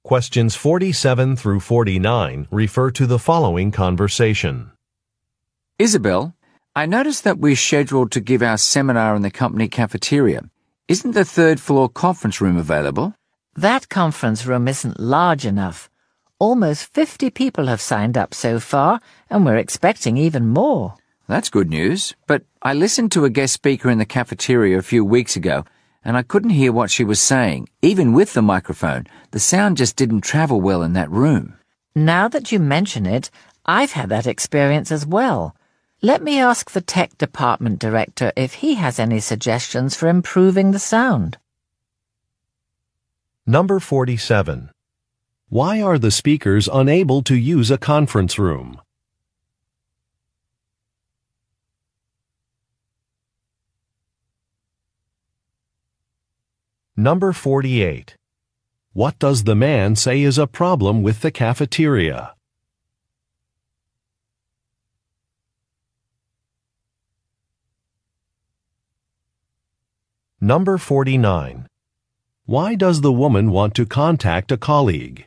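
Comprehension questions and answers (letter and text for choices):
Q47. Why are the speakers unable to use a conference room?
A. It is not large enough.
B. It is being remodeled.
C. It does not have a projector.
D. It has already been reserved.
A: A. It is not large enough.

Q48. What does the man say is a problem with the cafeteria?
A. The seats are uncomfortable.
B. The menu is limited.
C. The sound quality is poor.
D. The checkout lines are long.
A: C. The sound quality is poor.

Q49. Why does the woman want to contact a colleague?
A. To ask for a suggestion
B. To decline an invitation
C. To discuss a budget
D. To revise a presentation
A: A. To ask for a suggestion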